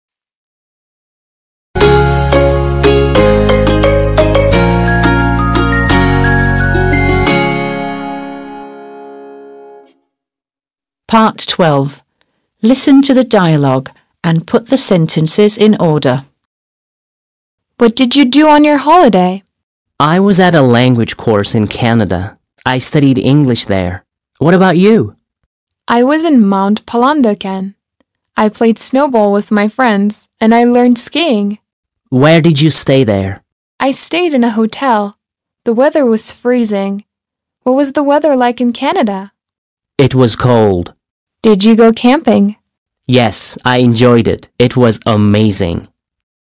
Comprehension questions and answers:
12. Listen to the dialogue and put the sentences in order.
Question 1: Alice: What did you do on your holiday?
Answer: 1

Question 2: Simon: I was at a language course in Canada. I studied English there. What about you?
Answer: 2

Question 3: Alice: I was in Mount Palandöken. I played snowball with my friends, and I learned skiing.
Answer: 3

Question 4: Simon: Where did you stay there?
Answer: 4

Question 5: Alice: I stayed in a hotel. The weather was freezing. What was the weather like in Canada?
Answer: 5

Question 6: Simon: It was cold.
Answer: 6

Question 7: Alice: Did you go camping?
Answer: 7

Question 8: Simon: Yes. I enjoyed it. It was amazing.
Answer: 8

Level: 6. Sınıf